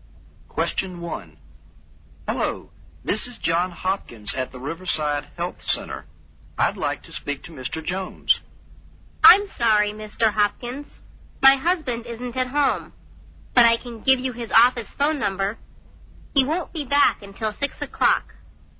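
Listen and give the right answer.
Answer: At his office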